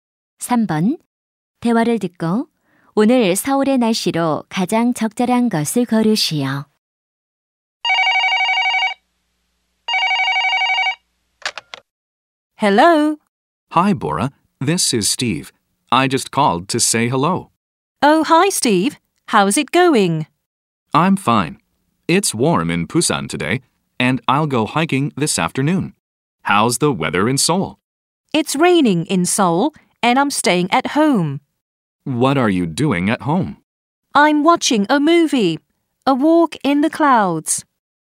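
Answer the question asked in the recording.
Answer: 비가 옴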